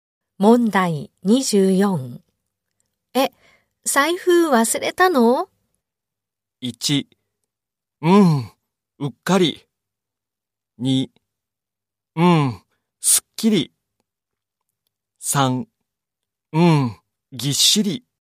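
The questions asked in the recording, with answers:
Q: 財布忘れたの?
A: 1: うっかり。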